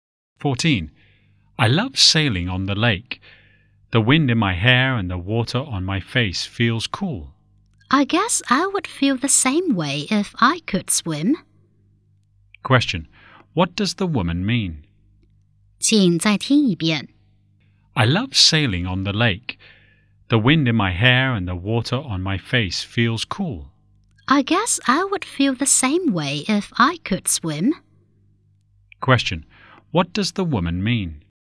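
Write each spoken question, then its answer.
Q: what does the woman mean?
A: She can't swim, so she doesn't enjoy sailing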